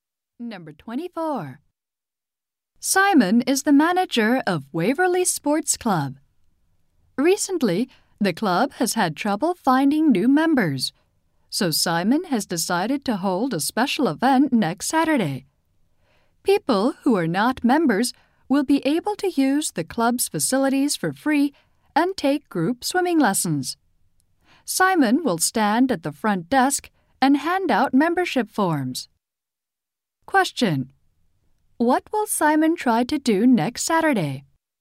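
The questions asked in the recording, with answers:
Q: What will Simon try to do next Saturday?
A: Attract new members to the club.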